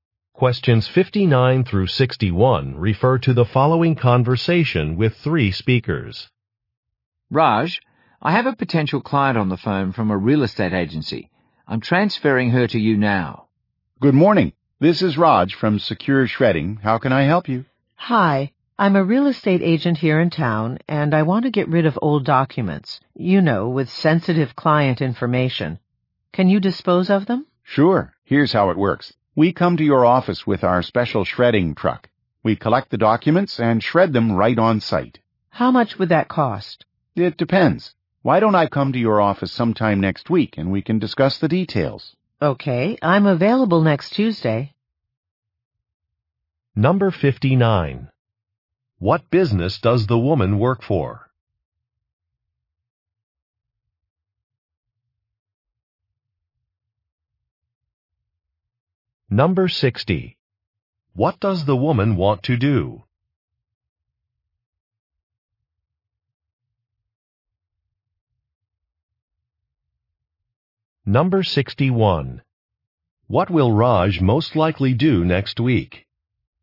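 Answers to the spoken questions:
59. A real estate agency
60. Get rid of old documents
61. Visit the woman's office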